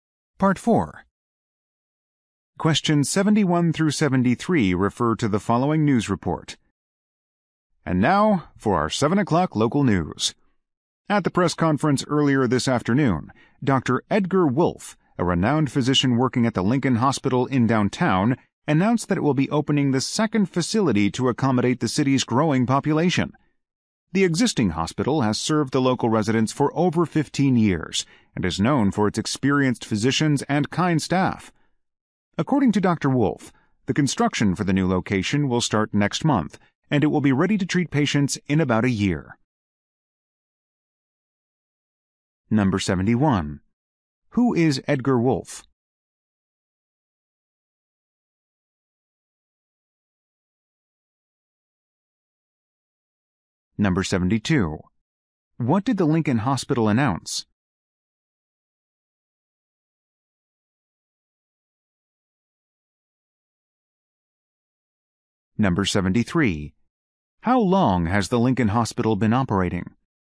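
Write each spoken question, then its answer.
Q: Who is Edgar Wolfe?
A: A physician at the Lincoln Hospital

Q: What did the Lincoln Hospital announce?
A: It will open a second facility

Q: How long has the Lincoln Hospital been operating?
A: Over 15 years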